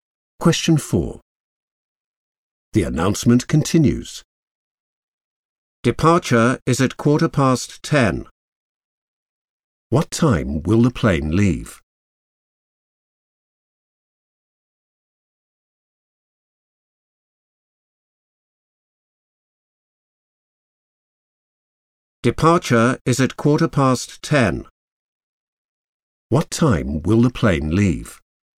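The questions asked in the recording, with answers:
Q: What time will the plane leave?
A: 10:15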